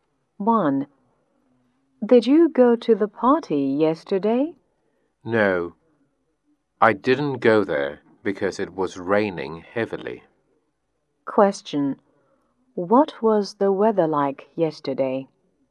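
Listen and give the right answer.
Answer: It was raining heavily.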